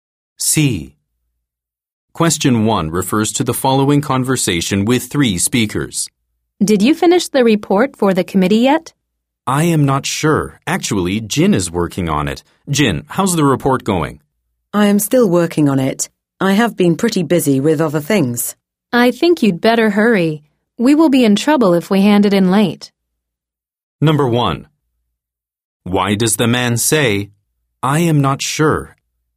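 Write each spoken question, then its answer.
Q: Why does the man say, I am not sure?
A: Because Jin is working on the report, not him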